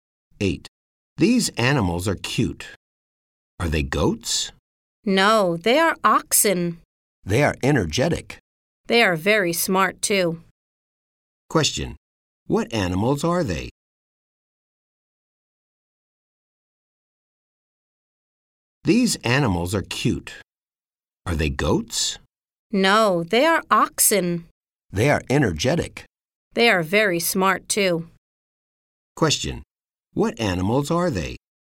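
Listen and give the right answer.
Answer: Oxen.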